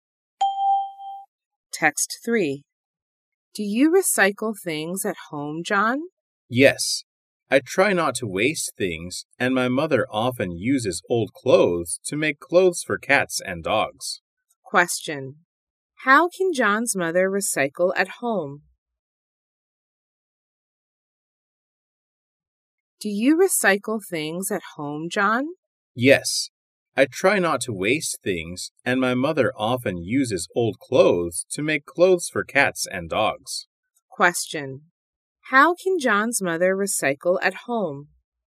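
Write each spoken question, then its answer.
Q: How can John's mother recycle at home?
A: She uses old clothes to make clothes for cats and dogs.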